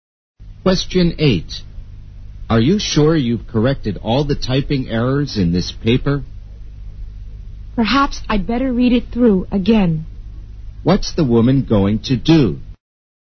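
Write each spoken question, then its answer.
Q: What's the woman going to do?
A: Read the paper through again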